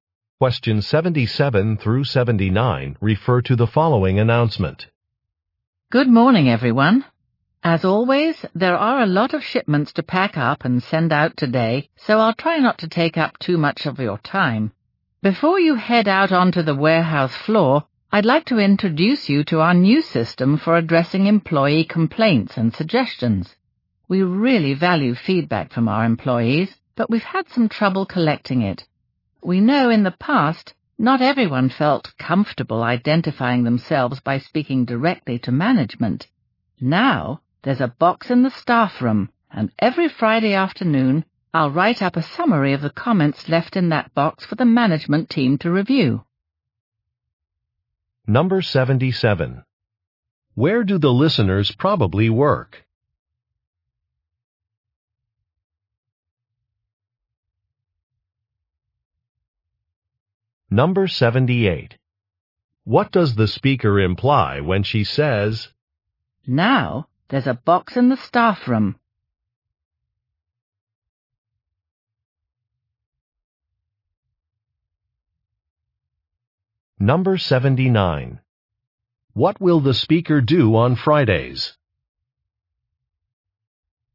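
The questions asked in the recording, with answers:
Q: Where do the listeners probably work?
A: At a warehouse

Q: What will the speaker do on Fridays?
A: Write a summary of the comments for management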